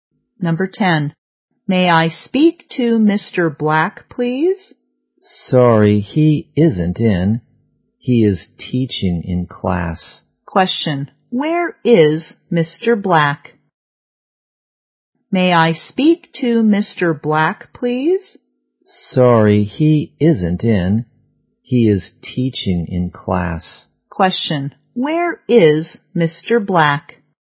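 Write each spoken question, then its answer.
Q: Where is Mr. Black?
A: In class (teaching)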